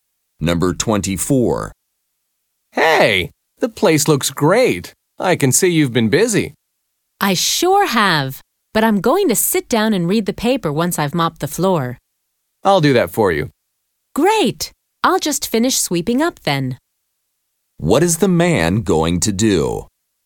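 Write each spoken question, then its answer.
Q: What is the man going to do?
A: Mop the floor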